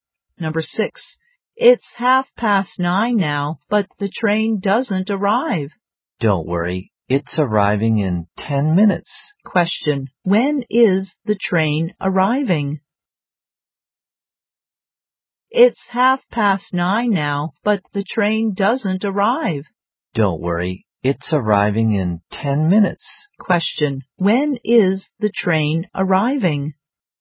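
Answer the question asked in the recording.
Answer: At 9:40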